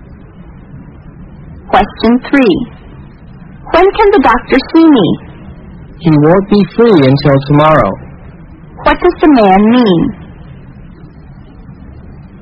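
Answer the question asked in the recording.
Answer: The doctor can see her tomorrow at the earliest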